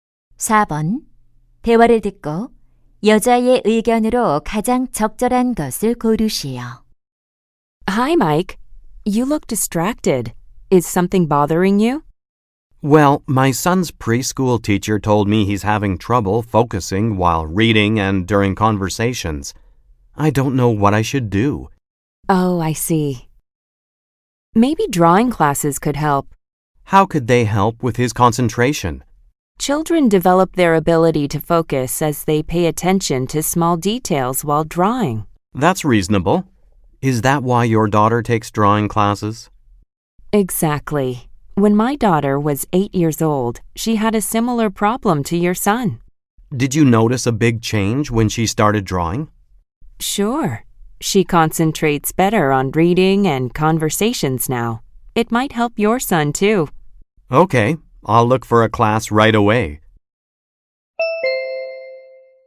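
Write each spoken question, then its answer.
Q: 대화를 듣고 여자의 의견으로 가장 적절한 것을 고르시오.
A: 그림 그리기 수업은 아이의 집중력 향상에 도움이 된다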